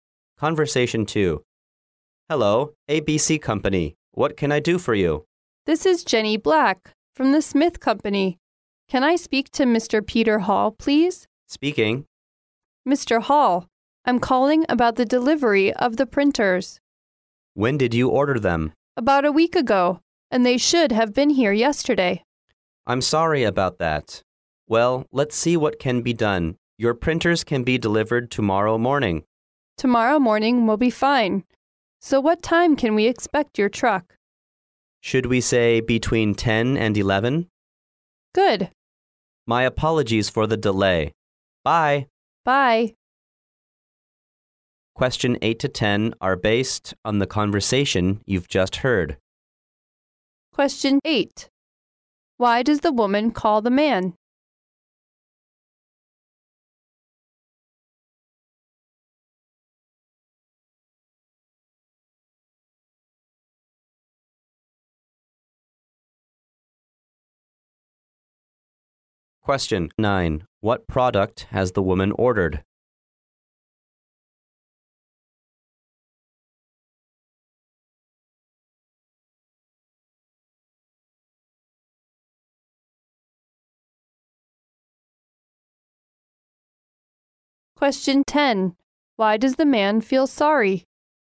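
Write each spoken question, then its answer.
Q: Why does the woman call the man?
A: About the late delivery of the printers.

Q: What product has the woman ordered?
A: Printers.

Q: Why does the man feel sorry?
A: Because the printers were delivered late.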